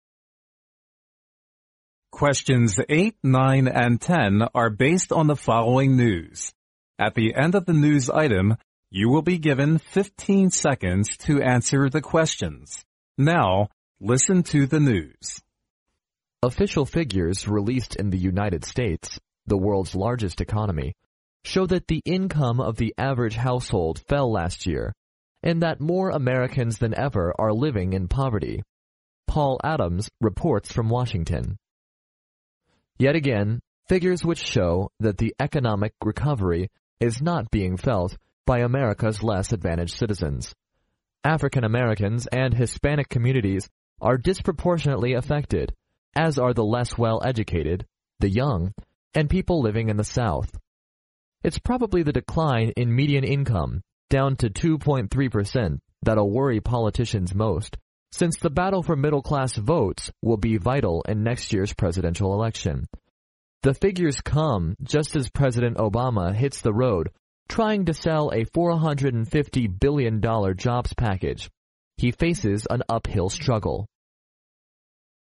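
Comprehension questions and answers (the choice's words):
Now listen to the news.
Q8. Which of the following statements is INCORRECT?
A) The United States is the world's largest economy.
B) The income of the average American household declined last year.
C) More Americans than ever are living in poverty.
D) The economic recovery is being felt by all Americans.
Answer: The economic recovery is being felt by all Americans.

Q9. According to the news item, Americans are disproportionately affected by the economic depression EXCEPT _____.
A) the advantaged citizens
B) the poor-educated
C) the young and people living in the south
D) African Americans and Hispanic communities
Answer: the advantaged citizens

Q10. Why does the decline in median income worry politicians most?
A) Because the middle class haven't felt the economic recovery,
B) Because the middle class's votes will be important in next year's presidential election.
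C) Because the middle class are in the vast majority in the world's largest economy.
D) Because the middle class are facing an uphill struggle.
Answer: Because the middle class's votes will be important in next year's presidential election.

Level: 英语四级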